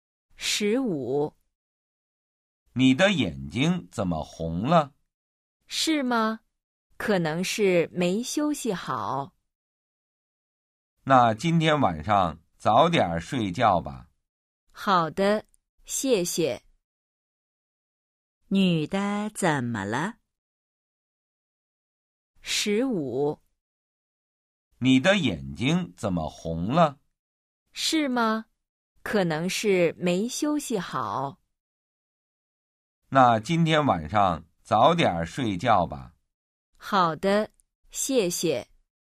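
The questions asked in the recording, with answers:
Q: 女的怎么了?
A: 眼睛红了,可能没休息好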